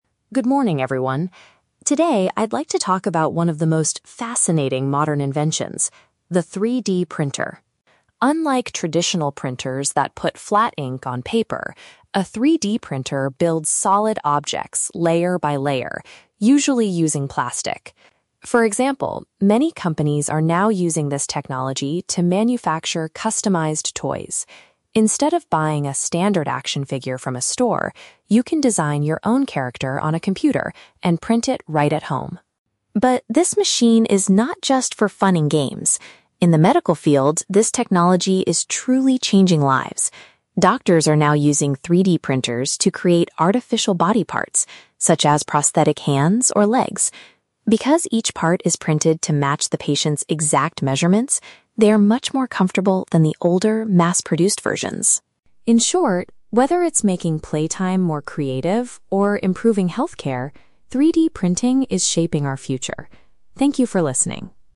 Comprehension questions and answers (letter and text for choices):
Listen to a student giving a short presentation about an invention. For each question, choose the correct answer (A, B, or C).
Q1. What does the speaker say about making toys with a 3D printer?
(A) People can create personalized toys using their own computers.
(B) Companies use traditional ink to print standard action figures.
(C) The toys are mostly produced in large factories overseas.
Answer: (A) People can create personalized toys using their own computers.

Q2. According to the speaker, why are 3D-printed medical parts better than older versions?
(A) They are completely free of charge for all patients.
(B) They are designed to fit the specific size of the individual.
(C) They are mass-produced in a much shorter amount of time.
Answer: (B) They are designed to fit the specific size of the individual.

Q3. What is the main purpose of the speaker's presentation?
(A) To explain how to repair a broken 3D printer at home.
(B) To show how a specific machine is useful in different ways.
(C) To warn the class about the negative effects of new technology.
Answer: (B) To show how a specific machine is useful in different ways.

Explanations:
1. The speaker mentions that you can "design your own character on a computer and print it right at home." Option (A) correctly paraphrases this using the word "personalized" for "customized/your own." Option (B) is a trap; the speaker mentions "traditional ink" and "standard action figures" but says 3D printers are unlike traditional printers and are used instead of buying standard figures. Option (C) is plausible but not mentioned.
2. The audio states that each part is "printed to match the patient's exact measurements." Option (B) uses synonyms ("fit the specific size") for this phrase. Option (C) is a trap; the speaker says the older versions were "mass-produced", not the 3D-printed ones. Option (A) is not mentioned in the audio.
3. The speaker talks about the 3D printer and gives two distinct examples of its usefulness: making toys ("fun and games") and creating medical parts ("improving healthcare"). Option (A) is wrong because he doesn't talk about repairing anything. Option (C) is a trap; the tone is very positive, not a warning about negative effects.

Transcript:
Alex: Good morning, everyone. Today, I'd like to talk about one of the most fascinating modern inventions: the 3D printer.
Unlike traditional printers that put flat ink on paper, a 3D printer builds solid objects layer by layer, usually using plastic. For example, many companies are now using this technology to manufacture customized toys. Instead of buying a standard action figure from a store, you can design your own character on a computer and print it right at home.
But this machine is not just for fun and games. In the medical field, this technology is truly changing lives. Doctors are now using 3D printers to create artificial body parts, such as prosthetic hands or legs. Because each part is printed to match the patient's exact measurements, they are much more comfortable than the older, mass-produced versions.
In short, whether it's making playtime more creative or improving healthcare, 3D printing is shaping our future. Thank you for listening.